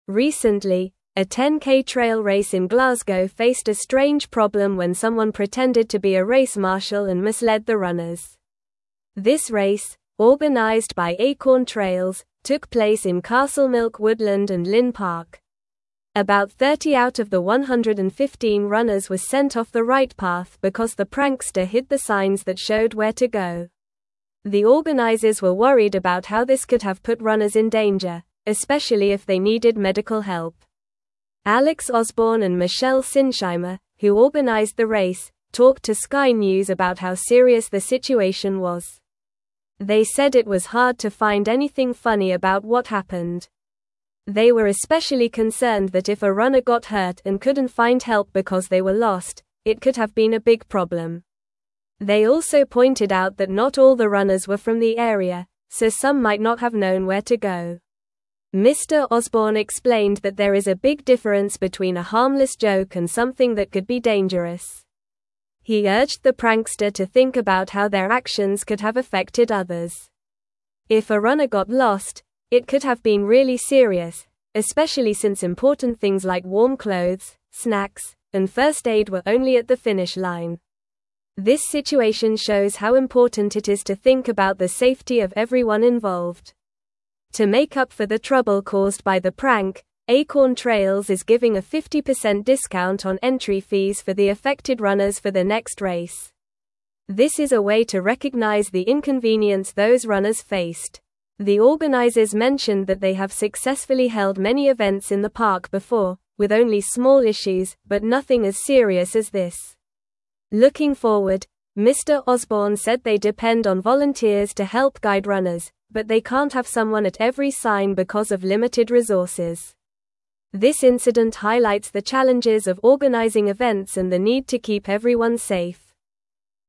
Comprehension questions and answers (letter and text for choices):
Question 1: Recently, a 10k trail race in Glasgow faced a (1)______ problem when someone (2)______ to be a race marshal and misled the runners.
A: strange

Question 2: Recently, a 10k trail race in Glasgow faced a (1)______ problem when someone (2)______ to be a race marshal and misled the runners.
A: pretended

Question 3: This race, (3)______ by Acorn Trails, took place in Castlemilk Woodland and Linn Park.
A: organized

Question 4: The (4)______ were worried about how this could have put runners in danger, especially if they needed medical help.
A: organizers

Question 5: They said it was hard to find anything (5)______ about what happened.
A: funny

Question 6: They were especially concerned that if a (6)______ got hurt and couldn't find help because they were lost, it could have been a big problem.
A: runner

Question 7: They also pointed out that not all the runners were from the area, so some might not have (7)______ where to go.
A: known

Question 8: Mr. Osborne explained that there is a big (8)______ between a harmless joke and something that could be dangerous.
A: difference

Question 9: If a runner got lost, it could have been really serious, especially since (9)______ things like warm clothes, snacks, and first aid were only at the finish line.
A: important

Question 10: This situation (10)______ how important it is to think about the safety of everyone involved.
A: shows

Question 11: To make up for the (11)______ caused by the prank, (12)______ Trails is giving a 50% discount on entry fees for the affected runners for their next race.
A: trouble

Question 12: To make up for the (11)______ caused by the prank, (12)______ Trails is giving a 50% discount on entry fees for the affected runners for their next race.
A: Acorn

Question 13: The organizers (13)______ that they have successfully held many events in the park before, with only small (14)______, but nothing as serious as this.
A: mentioned

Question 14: The organizers (13)______ that they have successfully held many events in the park before, with only small (14)______, but nothing as serious as this.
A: issues

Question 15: This incident (15)______ the challenges of (16)______ events and the need to keep everyone safe.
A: highlights

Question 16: This incident (15)______ the challenges of (16)______ events and the need to keep everyone safe.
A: organizing

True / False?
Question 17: A 10k trail race in Edinburgh had a solution when someone claimed to be a race marshal.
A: False

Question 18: The race was organized by Acorn Trails and took place in Castlemilk Woodland and Linn Park.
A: True

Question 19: The organizers rely on volunteers to help guide runners but can't have someone at every sign due to limited resources.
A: True

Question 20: The prankster's actions could have made it hard for lost runners to find help.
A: True

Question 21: The race organizers were relieved that runners were not in danger if they needed medical help.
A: False

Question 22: Alex Osborne and Michelle Sinsheimer spoke to Sky News about the lightheartedness of the situation.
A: False

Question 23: About 30 out of 115 runners were misled because the prankster hid the signs.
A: True

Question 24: What event did the prankster disrupt in Glasgow?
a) A marathon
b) A cycling race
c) A 10k trail race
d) A charity walk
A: c) A 10k trail race

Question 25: Who organized the race that was affected by the prank?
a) Acorn Trails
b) Glasgow Running Club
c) City Sports Events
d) Trail Runners United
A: a) Acorn Trails

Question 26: How many runners were misled by the prankster during the race?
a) 50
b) 70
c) 100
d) 30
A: d) 30

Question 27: What was the main concern of the race organizers regarding the prank?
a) The race would be delayed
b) Runners could be put in danger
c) Runners would complain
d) The weather would change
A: b) Runners could be put in danger

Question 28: What did the race organizers offer to the affected runners as compensation?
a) A 50% discount on entry fees for their next race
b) A free meal at the finish line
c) A medal for participation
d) A refund for the race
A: a) A 50% discount on entry fees for their next race

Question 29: What did Mr. Osborne emphasize about the prankster's actions?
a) They were meant to be funny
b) They were harmless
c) They were a common occurrence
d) They could have serious consequences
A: d) They could have serious consequences

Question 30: What resources did the organizers mention were only available at the finish line?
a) Water and energy drinks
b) Warm clothes, snacks, and first aid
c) Medals and certificates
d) T-shirts and hats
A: b) Warm clothes, snacks, and first aid

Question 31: What challenge did the organizers face regarding volunteers?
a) They had too many volunteers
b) Volunteers were not trained properly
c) They couldn't have someone at every sign due to limited resources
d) Volunteers were not interested in helping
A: c) They couldn't have someone at every sign due to limited resources

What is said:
Recently, a 10k trail race in Glasgow faced a strange problem when someone pretended to be a race marshal and misled the runners. This race, organized by Acorn Trails, took place in Castlemilk Woodland and Linn Park. About 30 out of the 115 runners were sent off the right path because the prankster hid the signs that showed where to go. The organizers were worried about how this could have put runners in danger, especially if they needed medical help.
Alex Osborne and Michelle Sinsheimer, who organized the race, talked to Sky News about how serious the situation was. They said it was hard to find anything funny about what happened. They were especially concerned that if a runner got hurt and couldn't find help because they were lost, it could have been a big problem. They also pointed out that not all the runners were from the area, so some might not have known where to go.
Mr. Osborne explained that there is a big difference between a harmless joke and something that could be dangerous. He urged the prankster to think about how their actions could have affected others. If a runner got lost, it could have been really serious, especially since important things like warm clothes, snacks, and first aid were only at the finish line. This situation shows how important it is to think about the safety of everyone involved.
To make up for the trouble caused by the prank, Acorn Trails is giving a 50% discount on entry fees for the affected runners for their next race. This is a way to recognize the inconvenience those runners faced. The organizers mentioned that they have successfully held many events in the park before, with only small issues, but nothing as serious as this. Looking forward, Mr. Osborne said they depend on volunteers to help guide runners, but they can't have someone at every sign because of limited resources. This incident highlights the challenges of organizing events and the need to keep everyone safe.

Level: Level 3